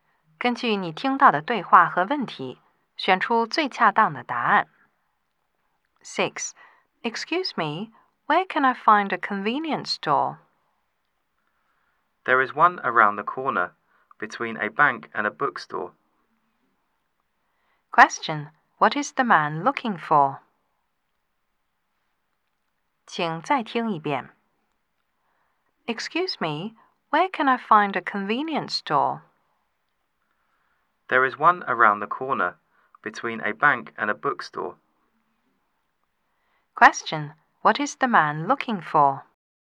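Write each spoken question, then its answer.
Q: Question, what is the man looking for?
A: A convenience store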